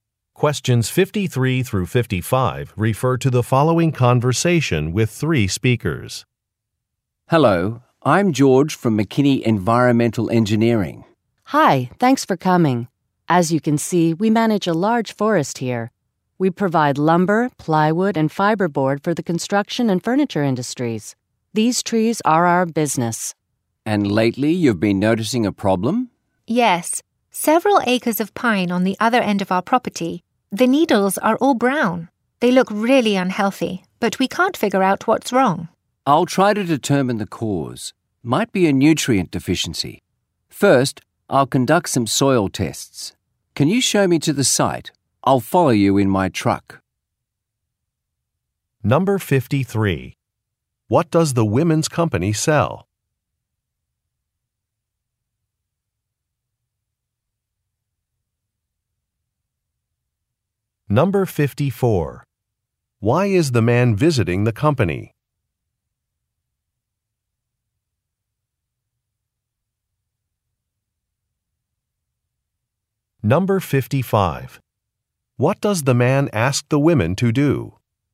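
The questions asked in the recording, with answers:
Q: What does the women's company sell?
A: Wood products such as lumber

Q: Why is the man visiting the company?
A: To find out what is wrong with some trees

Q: What does the man ask the women to do?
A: Show him to the site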